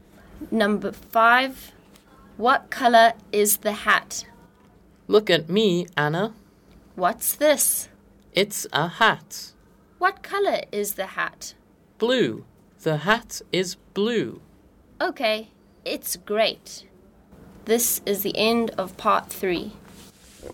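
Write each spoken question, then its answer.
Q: What color is the hat?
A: Blue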